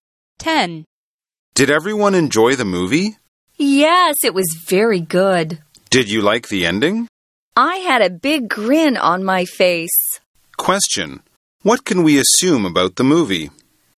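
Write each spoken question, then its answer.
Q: What can we assume about the movie?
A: It was good and had a happy ending.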